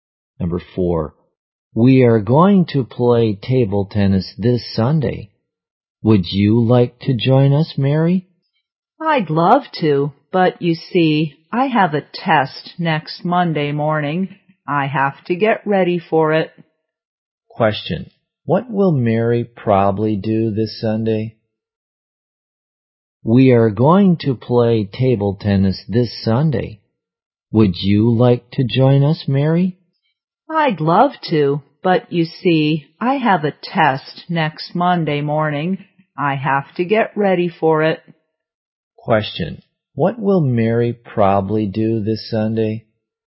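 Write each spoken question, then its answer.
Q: What will Mary probably do this Sunday?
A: Get ready for her test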